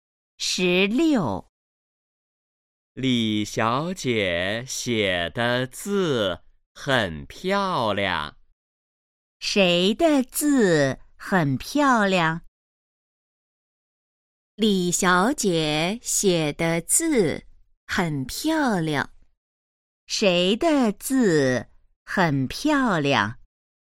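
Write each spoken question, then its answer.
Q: 谁的字很漂亮?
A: 李小姐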